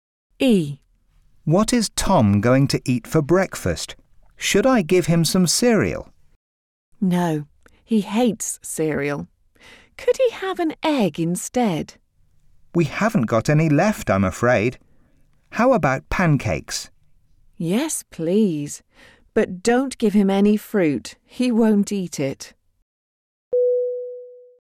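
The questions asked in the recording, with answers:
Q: What is Tom going to eat for breakfast?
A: Pancakes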